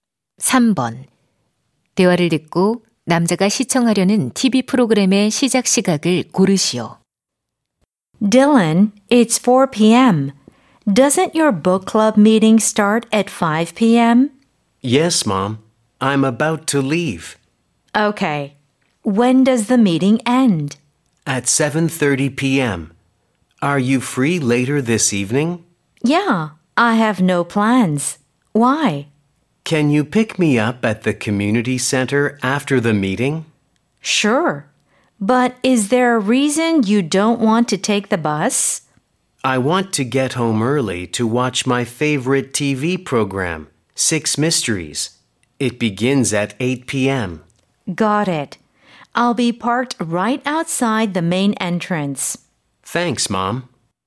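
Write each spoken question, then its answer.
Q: 대화를 듣고 남자가 시청하려는 TV 프로그램의 시작 시각을 고르시오.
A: 오후 8시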